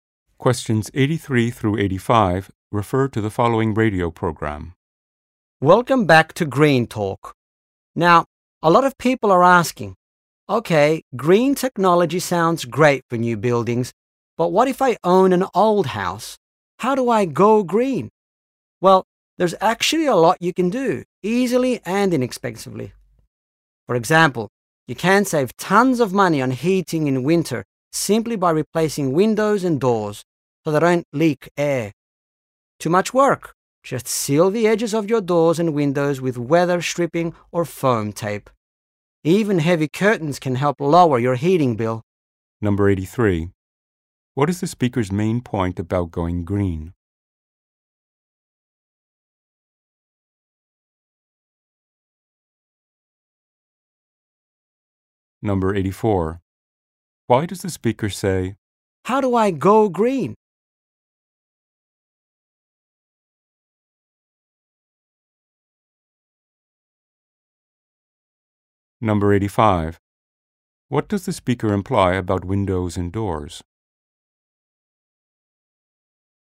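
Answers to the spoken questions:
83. Old houses can go green easily and inexpensively
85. Air leaking through them raises heating costs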